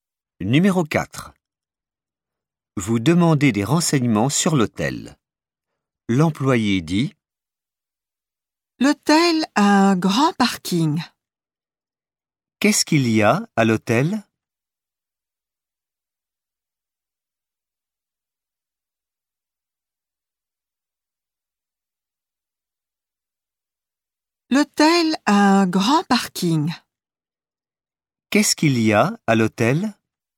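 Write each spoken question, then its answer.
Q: Qu'est-ce qu'il y a à l'hôtel?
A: Un grand parking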